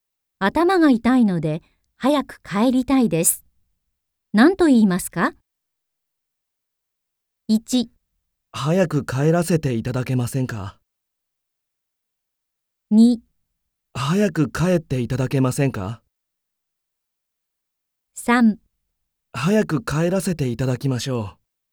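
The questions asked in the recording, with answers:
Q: 頭が痛いので早く帰りたいです。何と言いますか ?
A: 1: 早く帰らせていただけませんか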